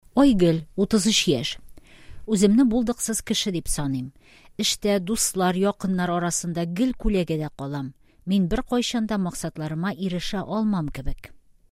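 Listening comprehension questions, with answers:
Бирем. Проверьте понимание текстов методом Әйе/Юк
Айгөл үз-үзенә ышанмый.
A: Әйе

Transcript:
Үземне булдыксыз кеше дип саныйм. Эштә, дуслар, якыннар арасында гел күләгәдә калам. Мин беркайчан да максатларыма ирешә алмам кебек.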